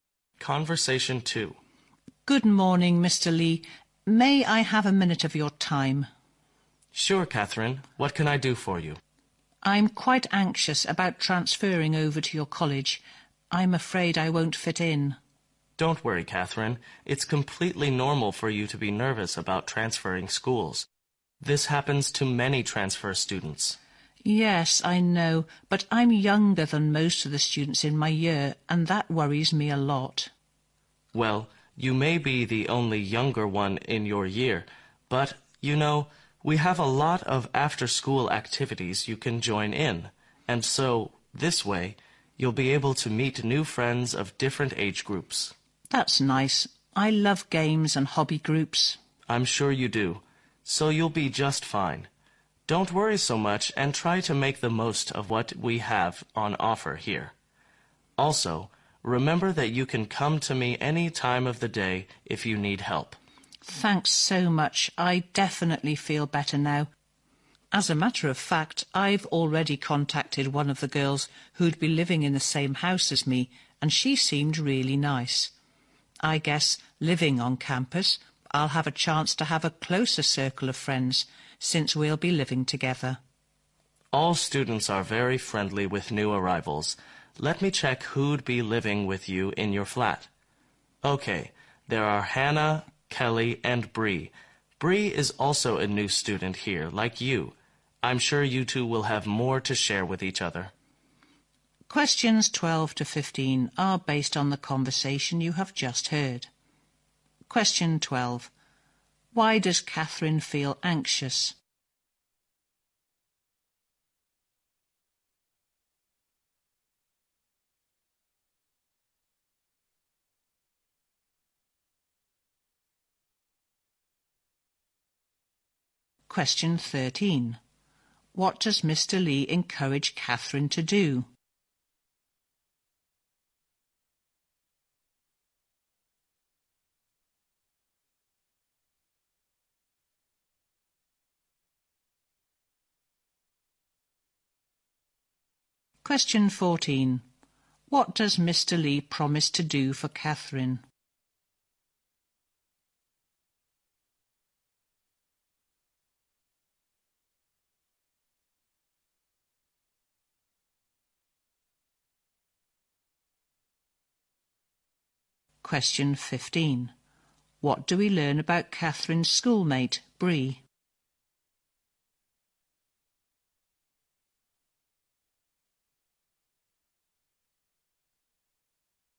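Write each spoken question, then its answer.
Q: Why does Catherine feel anxious?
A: She's afraid she won't fit in, since she's younger than most students in her year.

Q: What does Mr.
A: Join after-school activities and make the most of what the college offers.

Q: What does Mr.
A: Help her whenever she needs it, at any time of day.

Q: What do we learn about Catherine's schoolmate, Bree?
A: She is also a new student.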